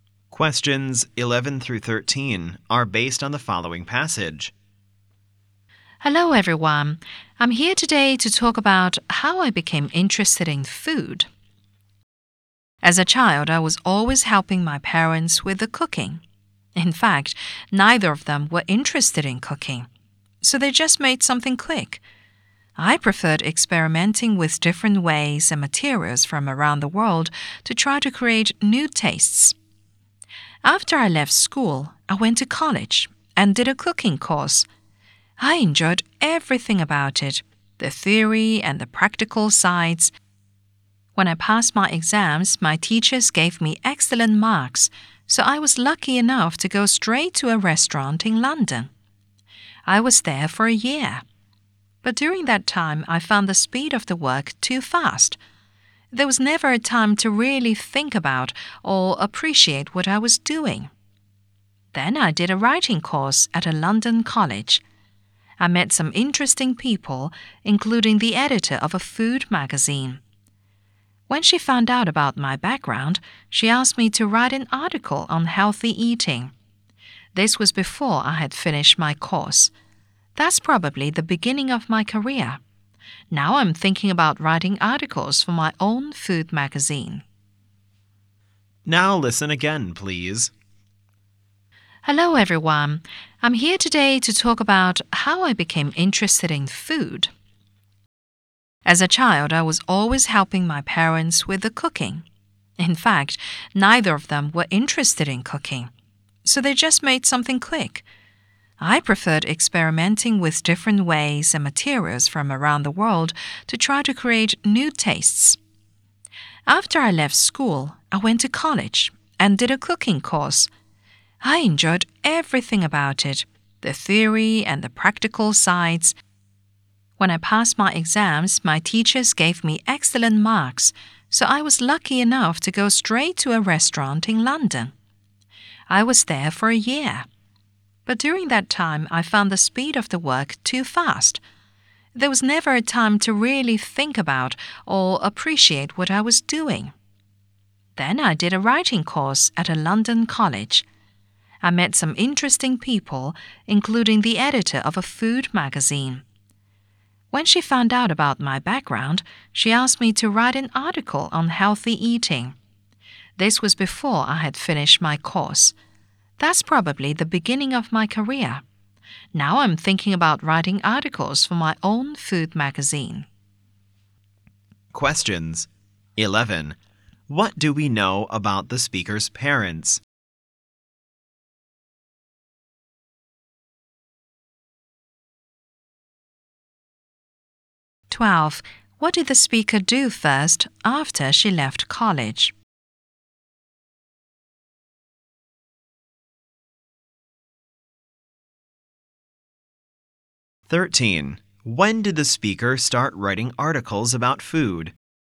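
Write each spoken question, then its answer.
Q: What do we know about the speaker's parents?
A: Neither was interested in cooking.

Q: What did the speaker do first after she left college?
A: She worked at a restaurant in London.

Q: When did the speaker start writing articles about food?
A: Before she finished her writing course.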